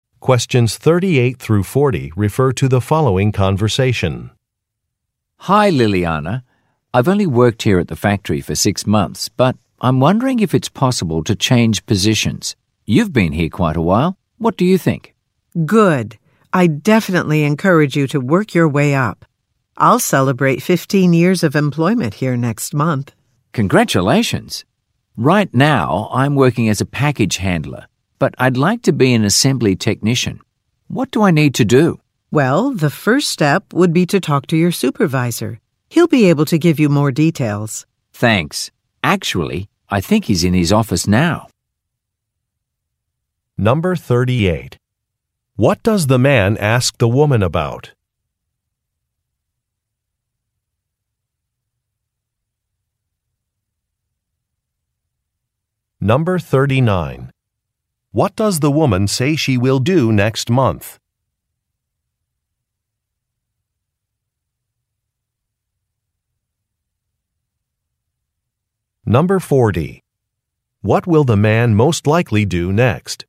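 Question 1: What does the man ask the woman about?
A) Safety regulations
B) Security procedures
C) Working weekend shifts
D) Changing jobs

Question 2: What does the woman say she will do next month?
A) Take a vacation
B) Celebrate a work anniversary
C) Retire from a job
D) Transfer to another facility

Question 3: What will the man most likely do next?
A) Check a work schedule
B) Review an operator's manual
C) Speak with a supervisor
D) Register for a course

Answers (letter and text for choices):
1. D) Changing jobs
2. B) Celebrate a work anniversary
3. C) Speak with a supervisor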